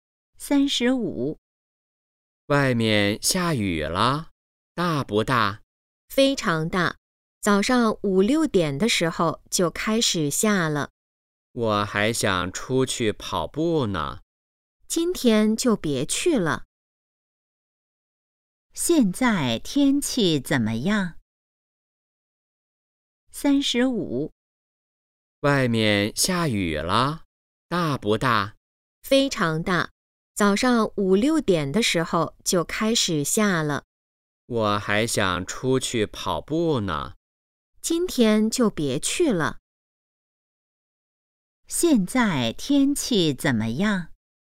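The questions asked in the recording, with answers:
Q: 现在天气怎么样?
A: 在下大雨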